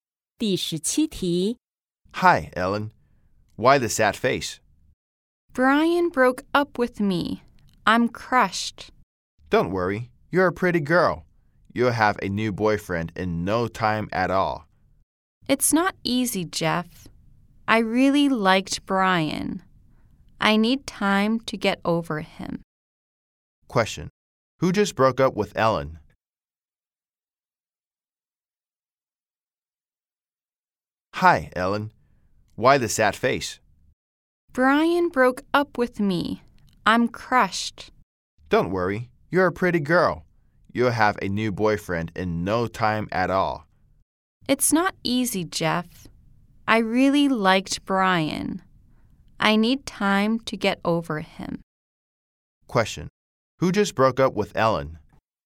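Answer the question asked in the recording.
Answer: Brian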